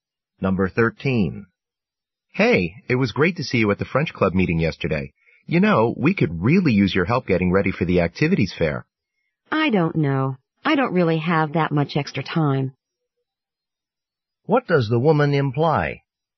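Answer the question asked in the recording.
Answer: She probably can't help because she doesn't have much time.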